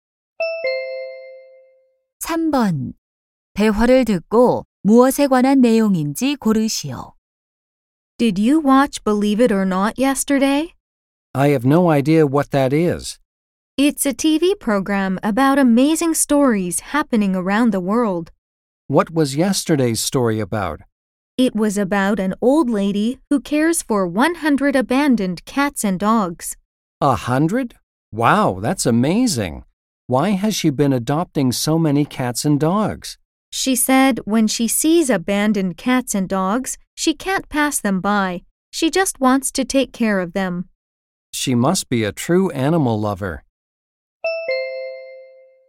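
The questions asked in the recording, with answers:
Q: 대화를 듣고 무엇에 관한 내용인지 고르시오.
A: 버려진 동물 100마리를 돌보는 할머니 이야기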